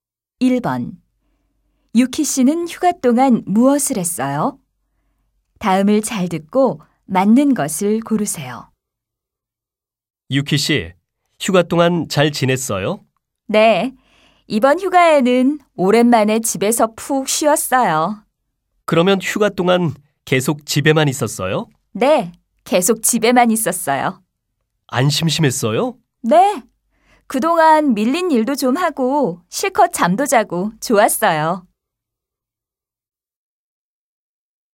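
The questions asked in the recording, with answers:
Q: 유키 씨는 휴가 동안 무엇을 했어요?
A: 집에서 푹 쉬었어요 (밀린 일도 하고 잠도 실컷 잤어요).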